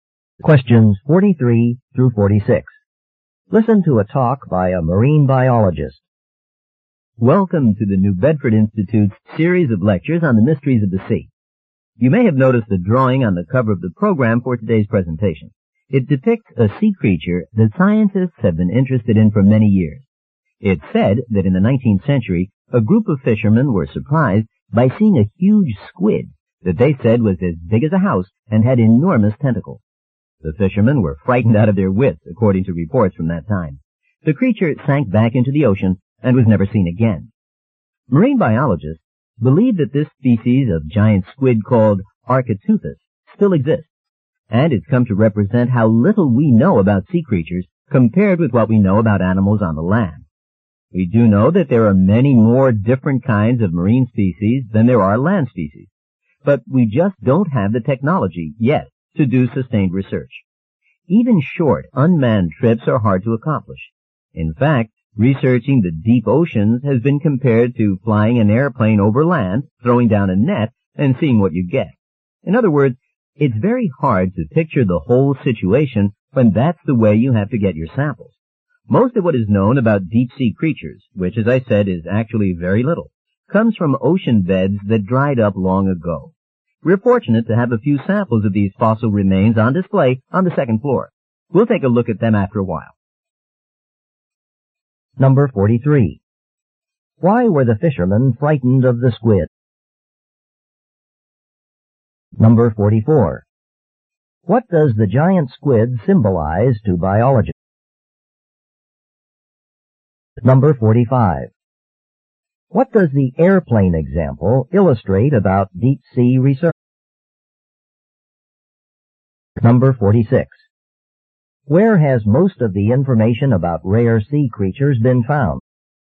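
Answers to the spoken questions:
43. It was huge, as big as a house, with enormous tentacles
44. How little we know about sea creatures
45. It is very hard to get a full picture from random samples
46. In ocean beds that dried up long ago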